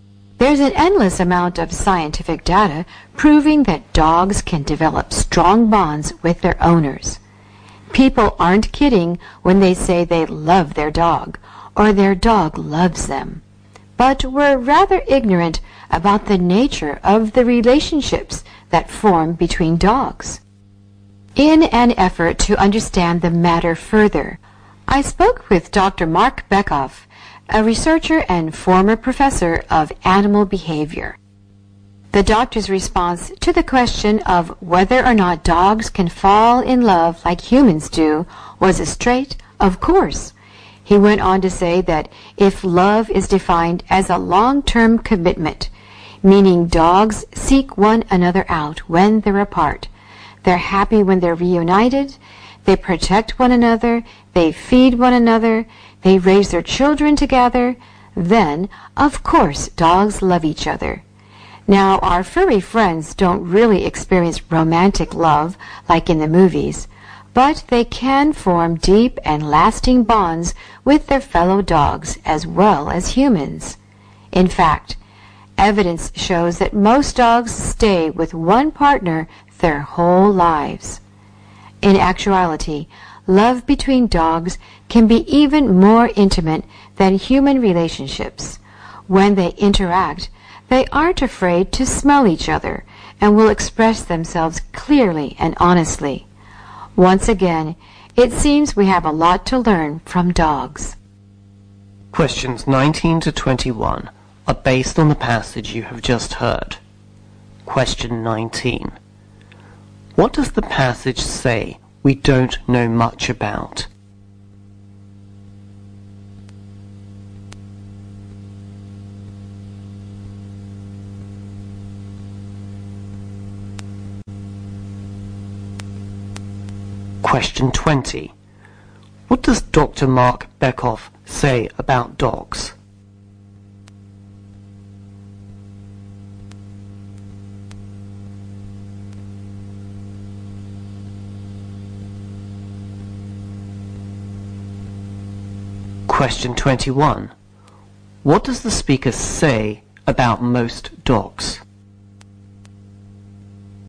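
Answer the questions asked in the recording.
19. The nature of the relationships that form between dogs
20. Of course dogs can fall in love with each other, like humans do
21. Most dogs stay with one partner their whole lives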